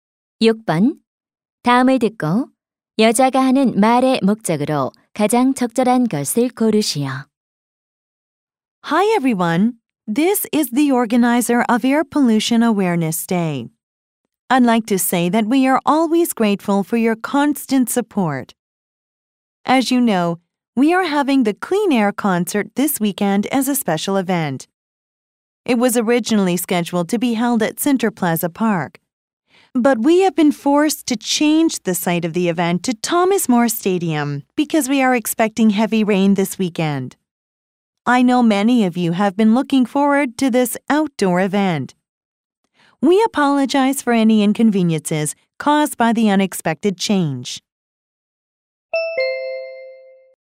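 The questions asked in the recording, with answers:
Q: 다음을 듣고 여자가 하는 말의 목적으로 가장 적절한 것을 고르시오.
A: 콘서트 장소 변경 공지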